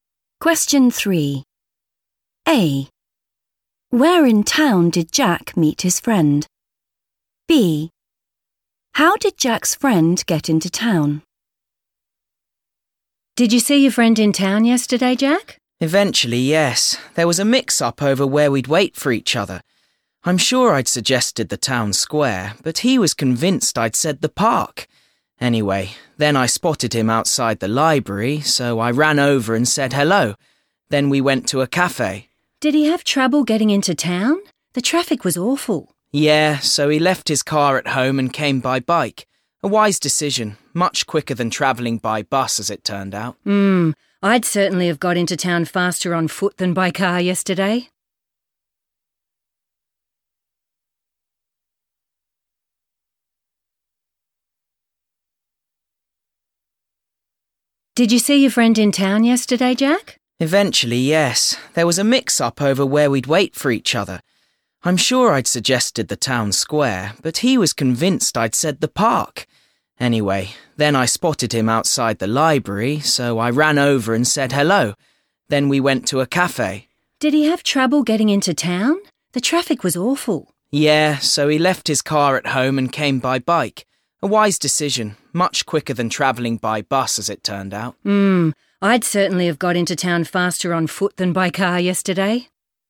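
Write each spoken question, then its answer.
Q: Where in town did Jack meet his friend?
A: outside the library

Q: How did Jack's friend get into town?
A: by bike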